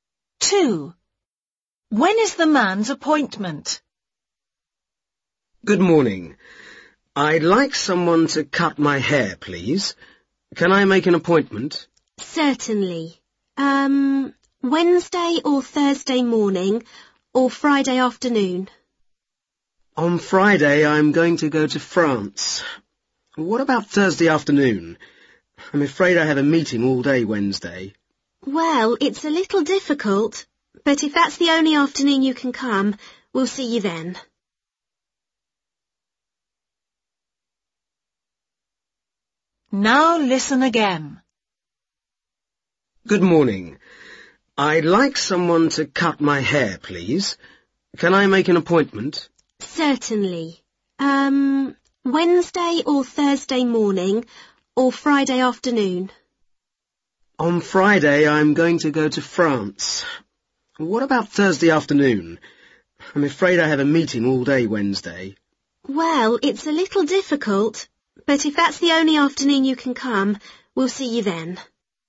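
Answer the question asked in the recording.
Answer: Thursday afternoon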